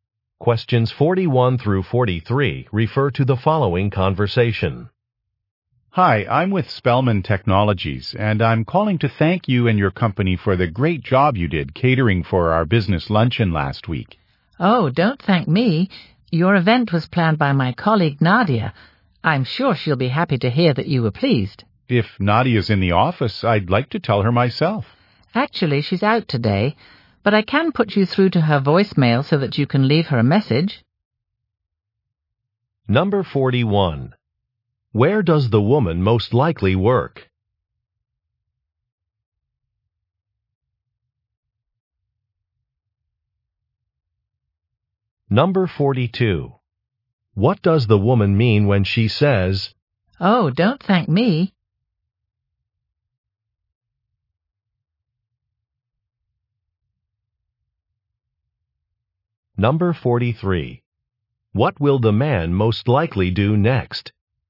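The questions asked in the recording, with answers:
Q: Where does the woman most likely work?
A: At a catering company

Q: What does the woman mean when she says,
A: Her colleague Nadia planned the event, not her

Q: What will the man most likely do next?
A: Leave Nadia a voicemail message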